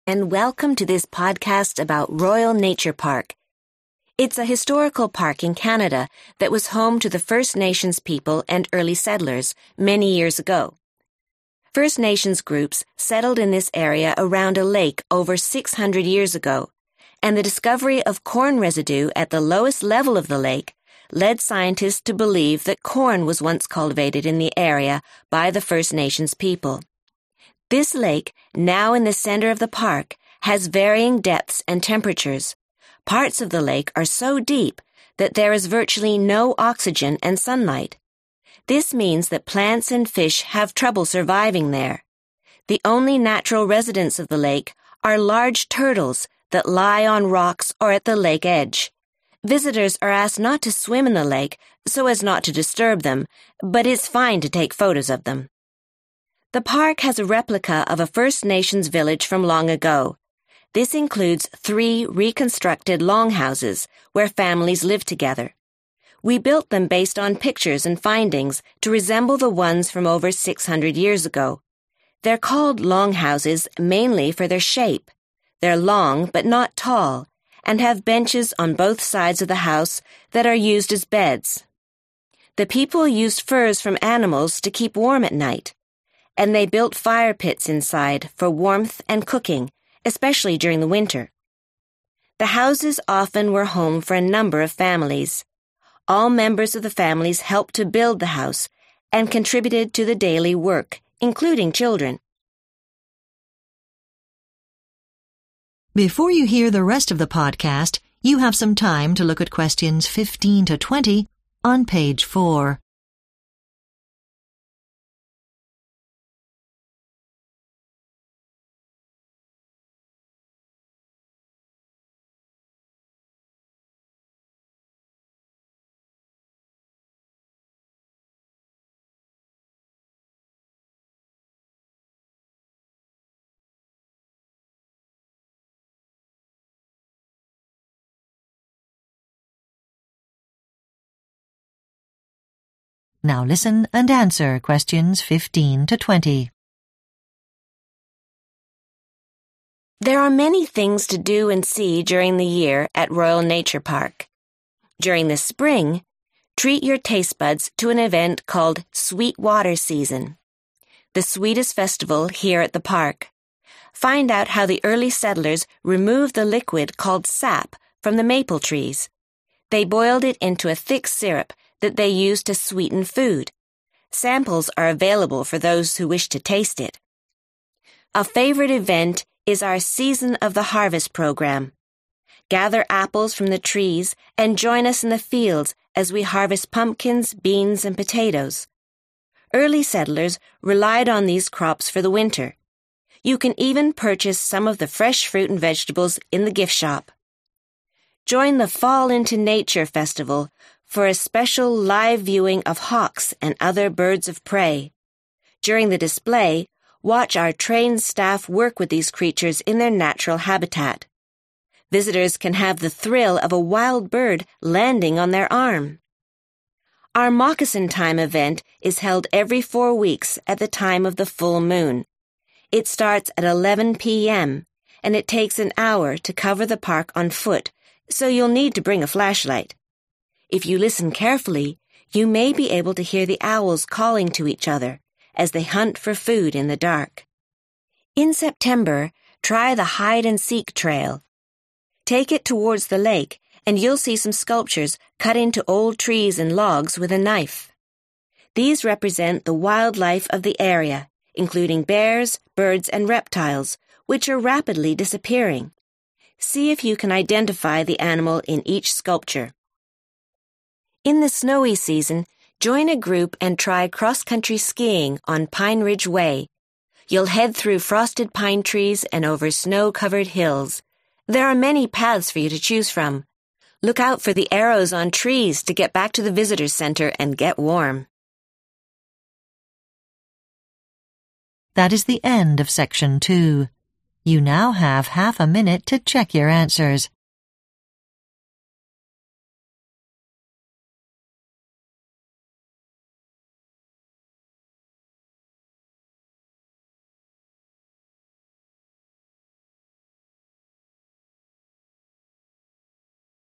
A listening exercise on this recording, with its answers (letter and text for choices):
Choose TWO answers.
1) Which TWO facts are given about the lake in the Royal Nature Park?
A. Aquatic life feeds on plants floating on the lake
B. Visitors can swim in any part of the lake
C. There is little life in the deepest parts of the lake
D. The lake has very low water levels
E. There is evidence that corn was grown nearby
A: C. There is little life in the deepest parts of the lake

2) Which TWO facts are given about the First Nations longhouses in the park?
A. They are built on two levels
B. Several families might live in one house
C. Animals were kept inside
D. Children helped to build them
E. They were later destroyed by fire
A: B. Several families might live in one house

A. enter a competition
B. pick produce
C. paint pictures of leaves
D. take a walk at night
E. follow winter trails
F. find carvings of endangered species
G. learn about production of a traditional food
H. participate in an animal show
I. feed the animals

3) Sweet Water Season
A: G. learn about production of a traditional food

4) Season of the Harvest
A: B. pick produce

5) Fall into Nature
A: H. participate in an animal show

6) Moccasin Time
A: D. take a walk at night

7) Hide and Seek Trail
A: F. find carvings of endangered species

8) Pine Ridge Way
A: E. follow winter trails